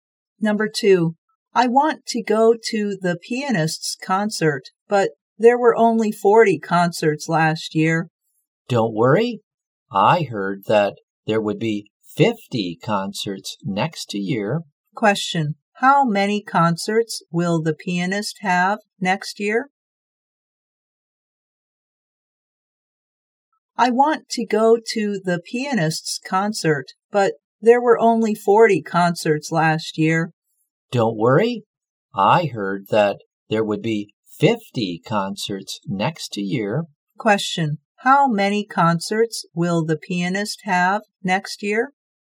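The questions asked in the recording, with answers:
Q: Question, how many concerts will the pianist have next year?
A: 50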